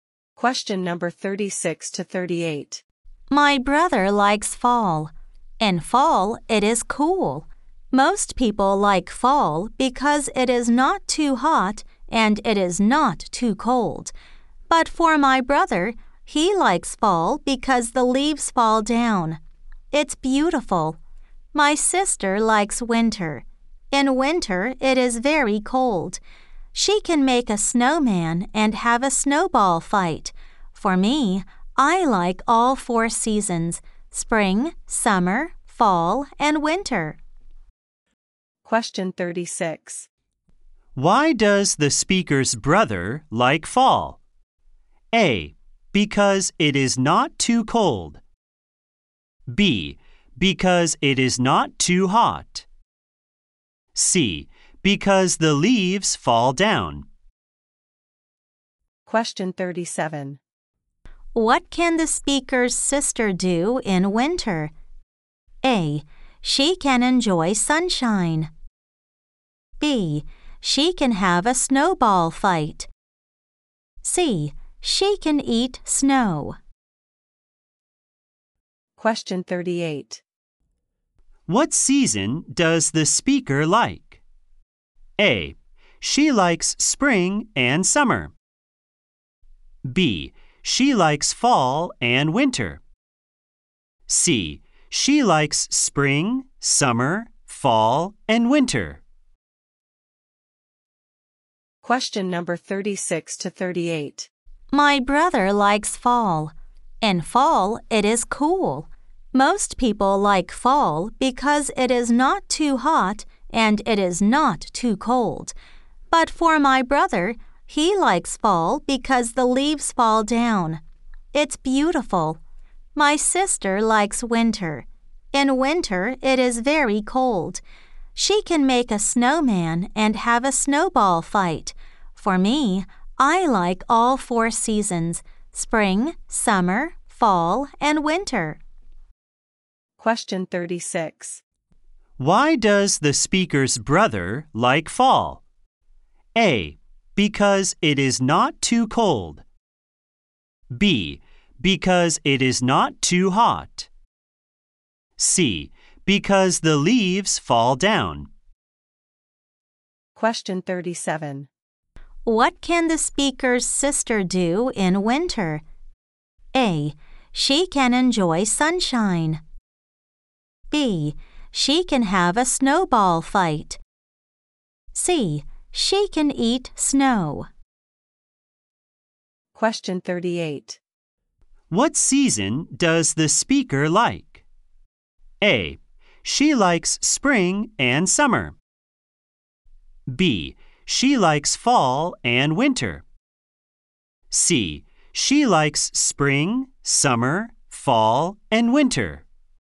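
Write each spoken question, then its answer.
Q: Why does the speaker's brother like fall?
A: C: Because the leaves fall down.

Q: What can the speaker's sister do in winter?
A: B: She can have a snowball fight.

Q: What season does the speaker like?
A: C: She likes spring, summer, fall, and winter.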